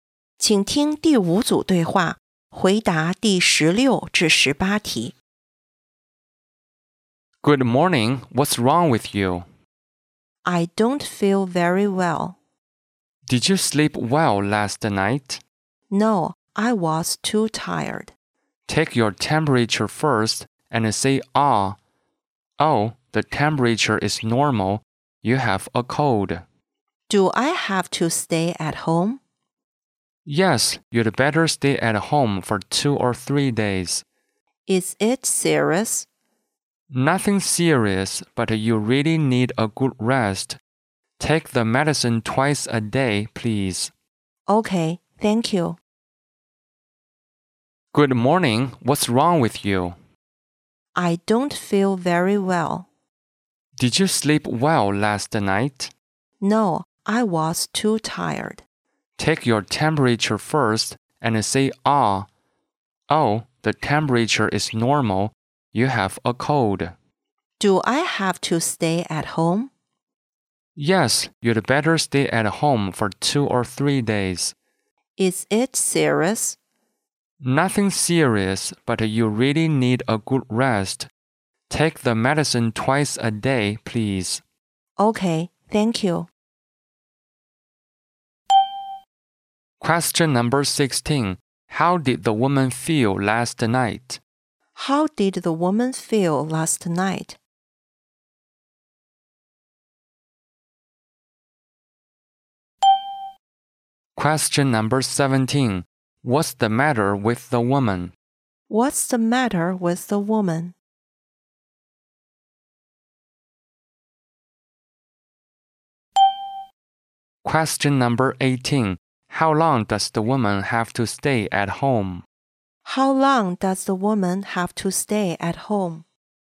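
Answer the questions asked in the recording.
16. Too tired
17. She has a cold
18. 2 or 3 days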